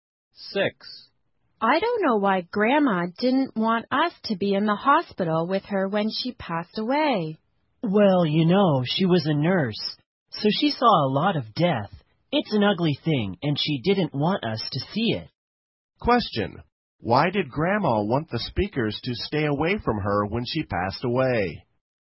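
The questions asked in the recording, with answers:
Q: Why did Grandma want the speakers to stay away from her when she passed away?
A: Death is ugly and she didn't want them to see it.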